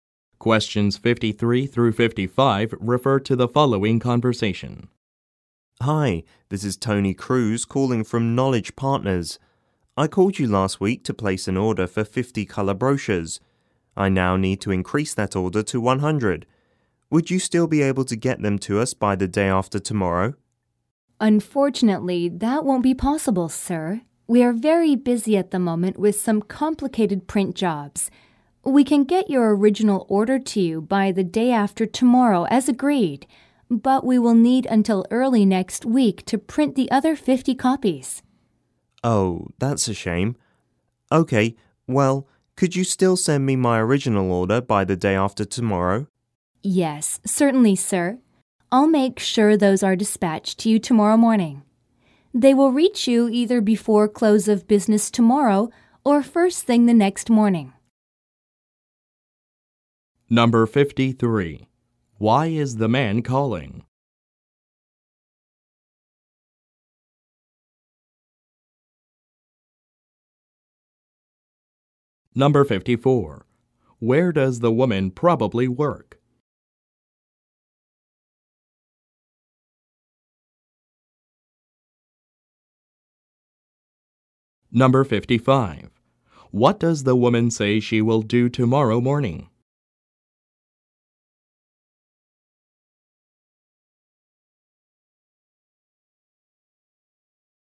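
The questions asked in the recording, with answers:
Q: Why is the man calling?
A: To increase his brochure order from 50 to 100

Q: Where does the woman probably work?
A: At a printing company

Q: What does the woman say she will do tomorrow morning?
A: Send out the original order of brochures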